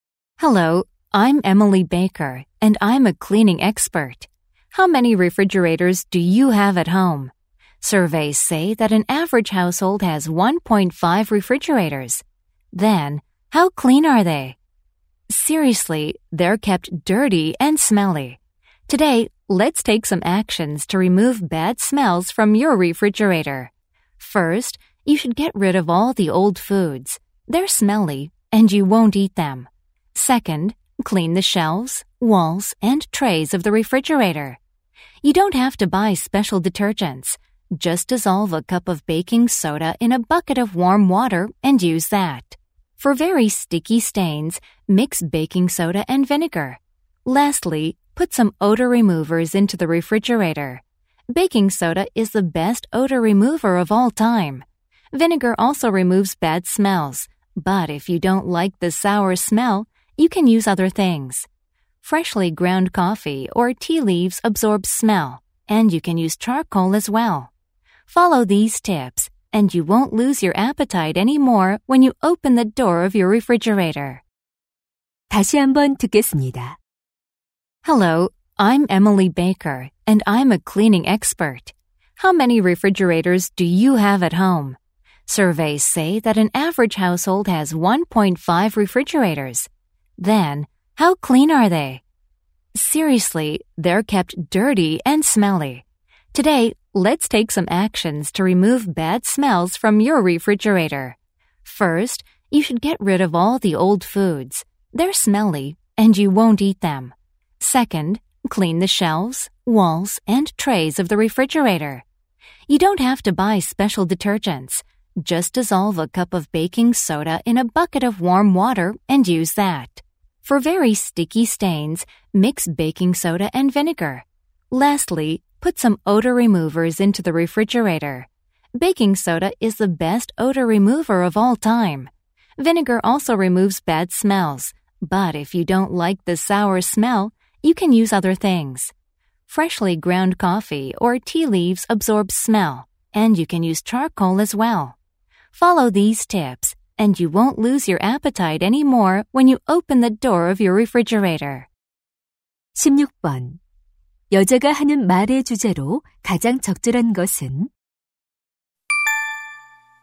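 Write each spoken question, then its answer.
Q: 여자가 하는 말의 주제로 가장 적절한 것은?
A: 냉장고의 악취를 없애는 방법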